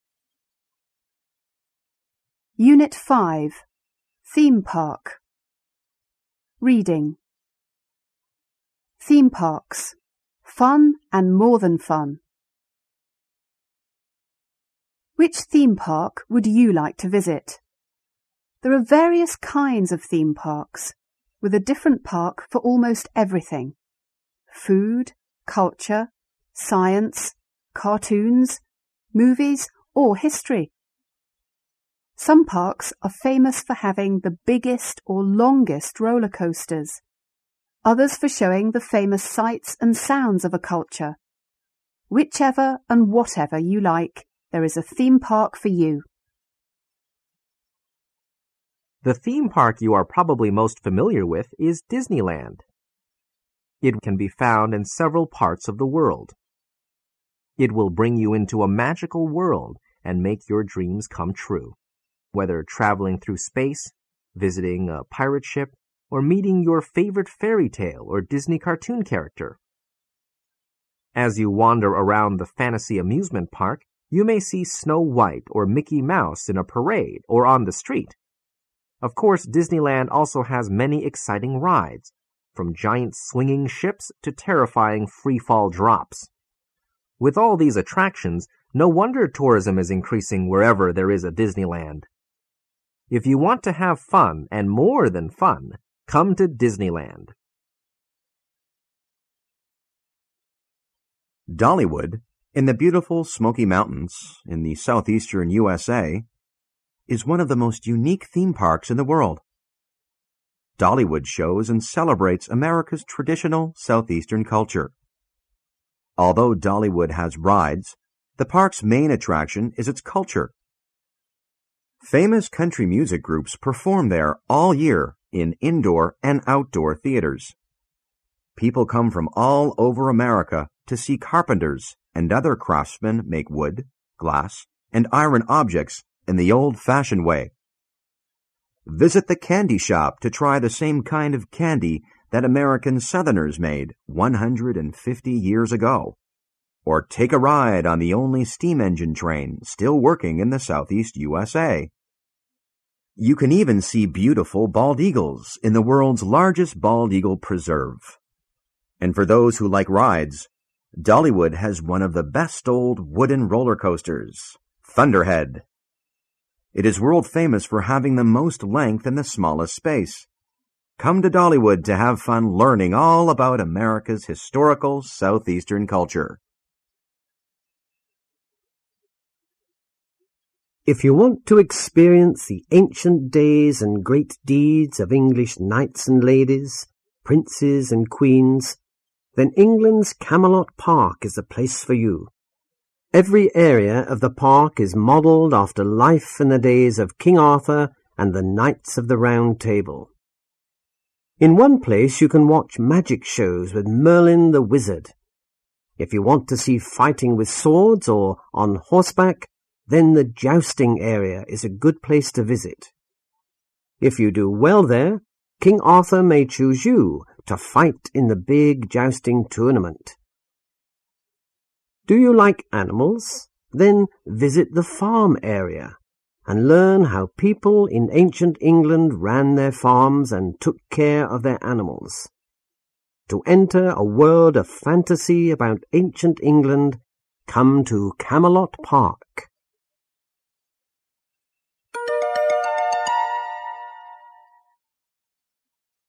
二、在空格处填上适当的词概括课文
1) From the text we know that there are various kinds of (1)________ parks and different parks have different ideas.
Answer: theme

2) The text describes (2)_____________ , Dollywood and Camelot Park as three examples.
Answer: Disneyland

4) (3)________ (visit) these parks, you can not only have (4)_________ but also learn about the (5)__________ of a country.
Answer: fun

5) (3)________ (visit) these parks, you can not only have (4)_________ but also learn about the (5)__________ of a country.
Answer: history

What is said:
THEME PARKS — FUN AND MORE THAN FUN
Which theme park would you like to visit? There are various kinds of theme parks, with a different park for almost everything: food, culture, science, cartoons, movies or history. Some parks are famous for having the biggest or longest roller coasters, others for showing the famous sights and sounds of a culture. Whichever and whatever you like, there is a theme park for you!
The theme park you are probably most familiar with is Disneyland. It can be found in several parts of the world. It will bring you into a magical world and make your dreams come true, whether traveling through space, visiting a pirate ship or meeting your favourite fairy tale or Disney cartoon character. As you wander around the fantasy amusement park, you may see Snow White or Mickey Mouse in a parade or on the street. Of course Disneyland also has many exciting rides, from giant swinging ships to terrifying free-fall drops. With all these attractions, no wonder tourism is increasing wherever there is a Disneyland. If you want to have fun and more than fun, come to Disneyland!
Dollywood, in the beautiful Smoky Mountains in the southeastern
USA, is one of the most unique theme parks in the world. Dollywood shows and celebrates America's traditional southeastern culture. Although Dollywood has rides, the park's main attraction is its culture. Famous country music groups perform there all year in indoor and outdoor theatres. People come from all over America to see carpenters and other craftsmen make wood, glass and iron objects in the old-fashioned way. Visit the candy shop to try the same kind of candy that American southerners made 150 years ago, or take a ride on the only steam- engine train still working in the southeast USA. You can even see beautiful bald eagles in the world's largest bald eagle preserve. And for those who like rides, Dollywood has one of the best old wooden roller coasters, Thunderhead. It is world-famous for having the most length in the smallest space. Come to Dollywood to have fun learning all about America's historical southeastern culture!
If you want to experience the ancient days and great deeds of English knights and ladies, princes and queens, then England's Camelot Park is the place for you. Every area of the park is modelled after life in the days of King Arthur and the Knights of the Round Table. In one place, you can watch magic shows with Merlin the Wizard. If you want to see fighting with swords or on horseback, then the jousting area is a good place to visit. If you do well there, King Arthur may choose you to fight in the big jousting tournament. Do you like animals? Then visit the farm area, and learn how people in ancient England ran their farms and took care of their animals. To enter a world of fantasy about ancient England, come to Camelot Park!